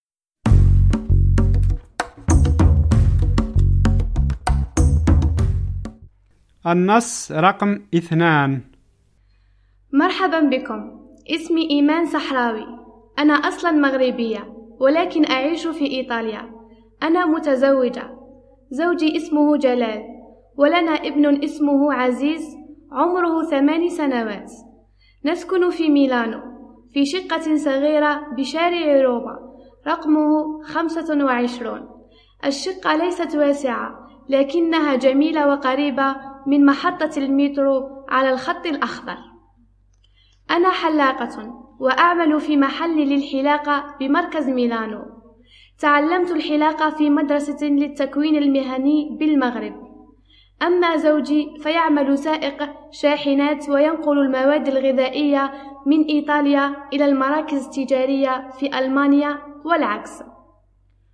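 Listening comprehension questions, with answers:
استمعْ / استمعي إلى النص ثم أَكمِل / أكمِلي الجُمَل التالية:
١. إيمان تسكن في ميلانو بشارع روما رقم __________ __________ .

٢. هي حلاّقة وتعمل في __________ __________ بمركز ميلانو.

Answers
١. خمسة وعشرون
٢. محل للحلاقة

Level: المستوى الأول الدرجة الثانية (A2)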